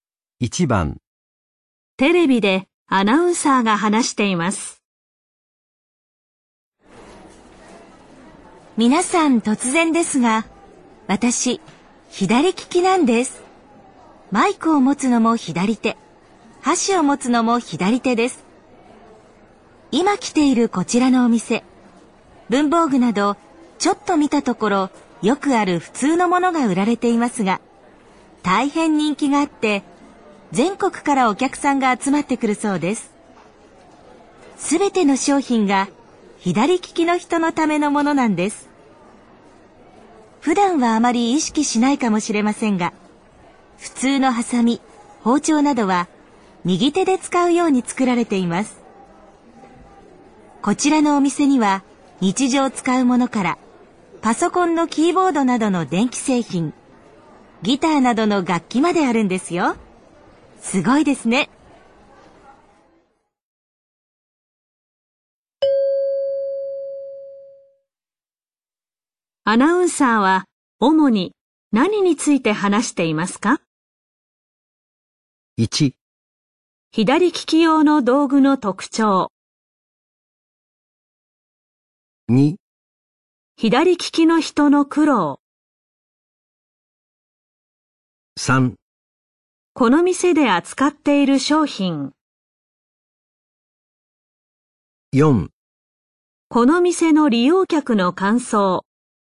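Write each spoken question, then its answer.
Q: ナウンサーは主に何について話していますか?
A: 3: この店で扱っている商品。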